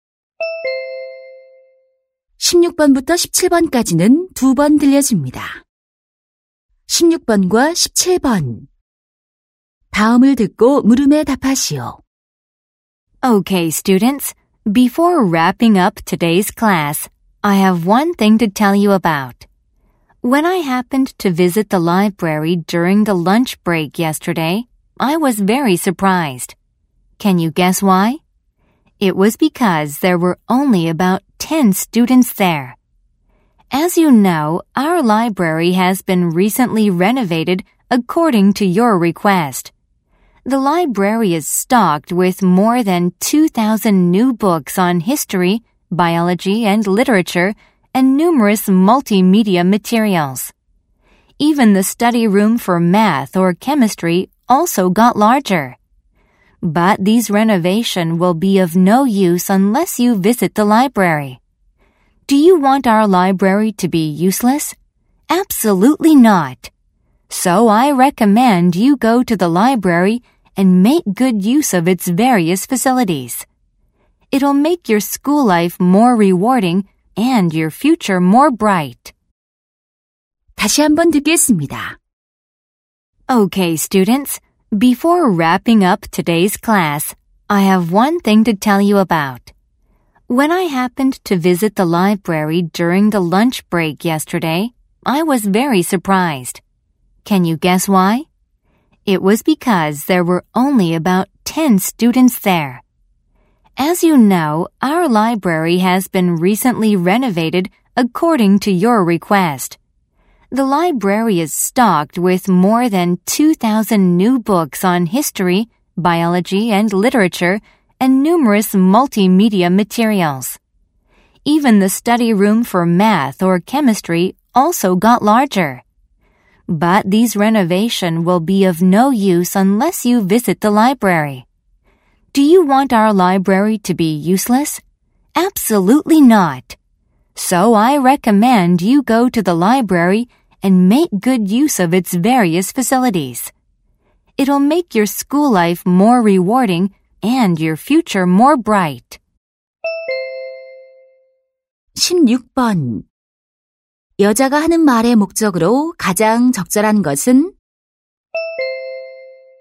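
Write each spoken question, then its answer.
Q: 여자가 하는 말의 목적으로 가장 적절한 것은?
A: 학생들에게 도서관 이용을 권장하려고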